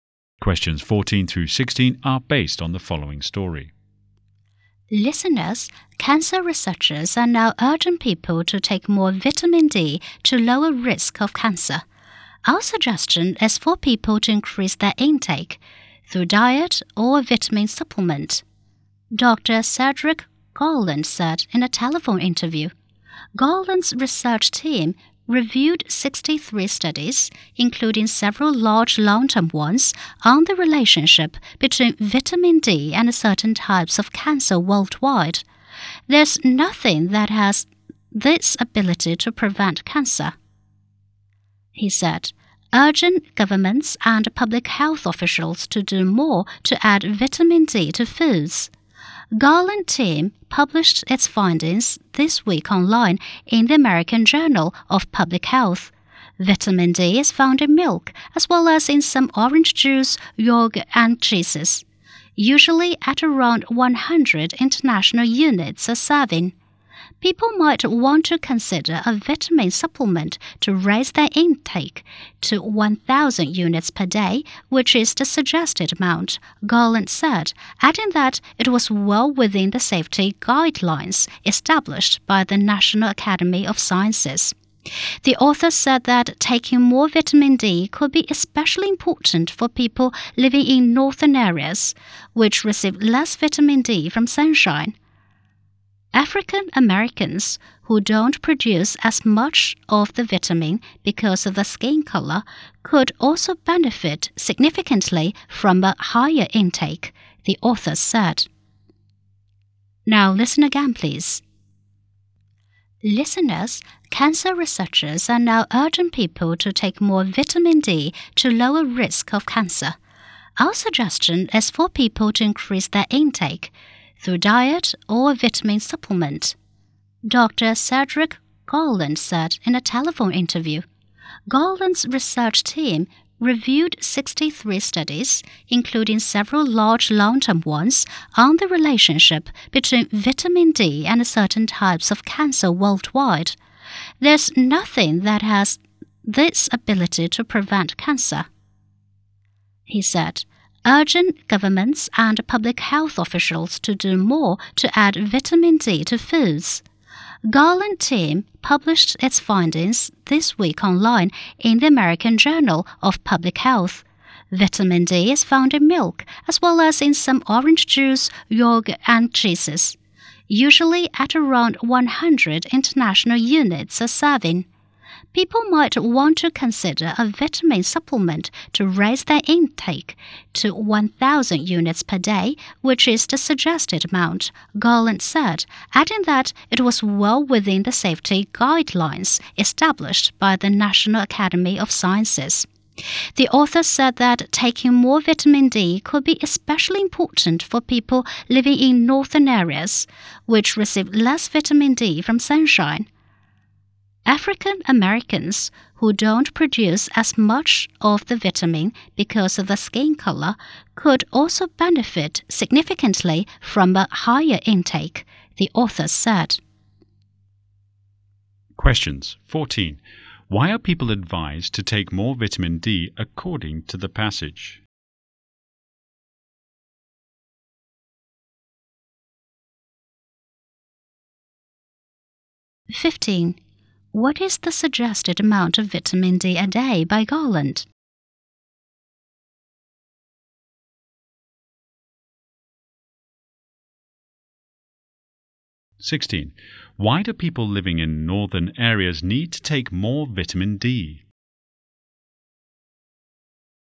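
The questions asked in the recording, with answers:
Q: Why are people advised to take more vitamin D according to the passage?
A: To lower the risk of cancer

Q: What is the suggested amount of vitamin D a day by Garland?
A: 1,000 units

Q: Why do people living in northern areas need to take more vitamin D?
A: They receive less vitamin D from sunshine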